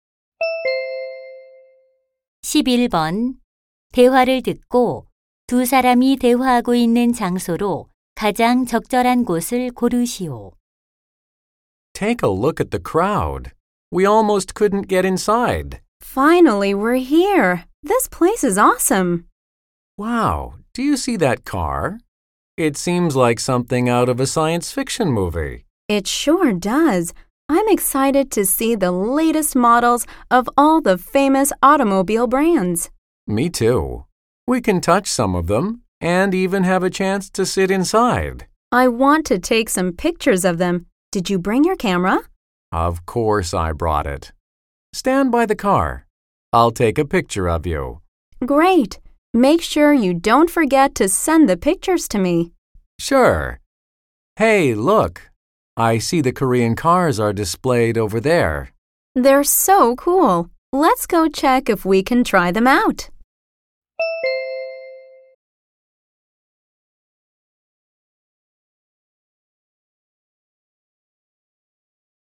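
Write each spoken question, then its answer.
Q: 대화를 듣고 두 사람이 대화하고 있는 장소로 가장 적절한 곳을 고르시오.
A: 모터쇼(자동차 전시회)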